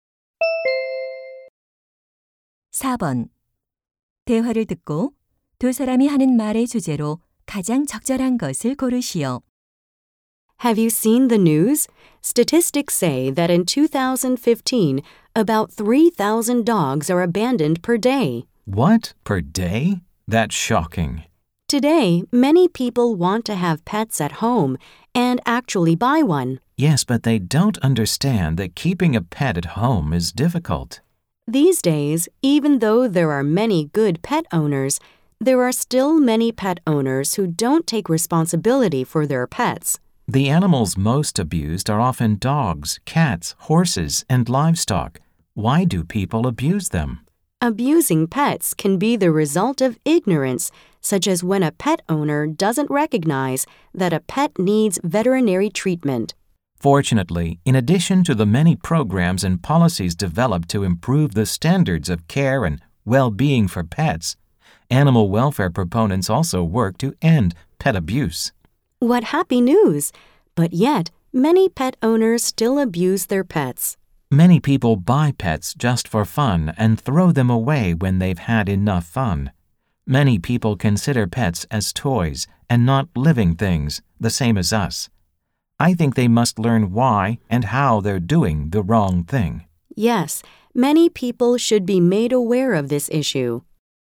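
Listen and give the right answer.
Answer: 반려동물 학대와 유기 문제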